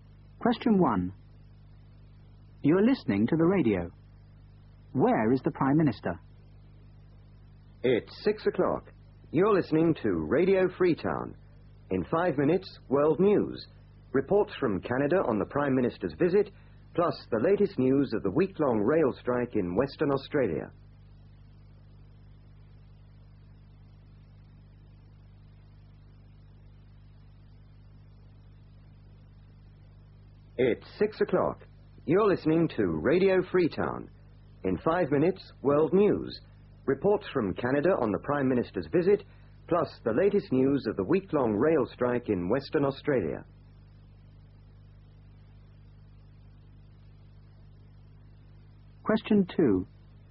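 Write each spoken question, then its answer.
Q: Where is the Prime Minister?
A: In Canada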